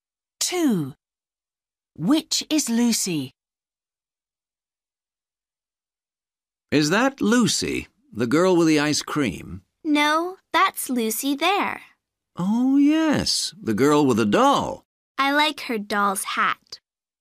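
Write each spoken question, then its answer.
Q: Which is Lucy?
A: the girl with a doll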